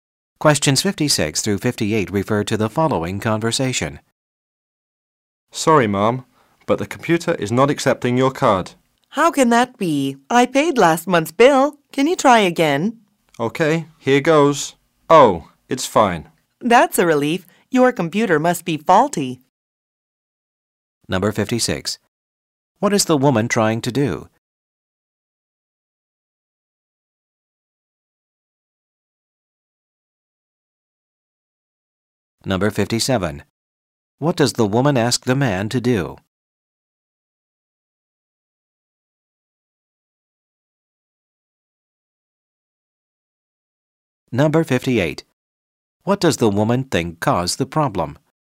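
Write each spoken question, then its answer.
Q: What does the woman ask the man to do?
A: Try again

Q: What does the woman think caused the problem?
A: A faulty computer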